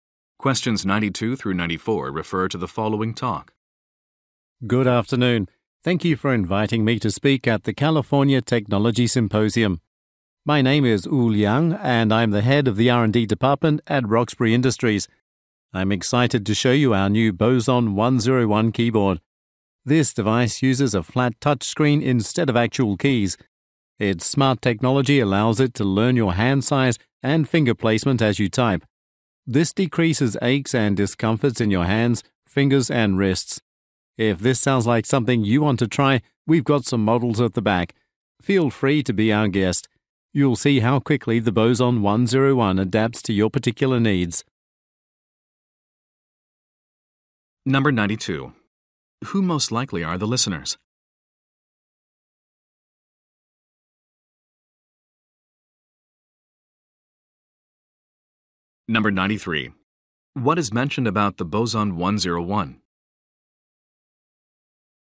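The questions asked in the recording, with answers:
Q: Who most likely are the listeners?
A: Technology symposium attendees

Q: What is mentioned about the boson 101?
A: It adapts to the user's hands and reduces discomfort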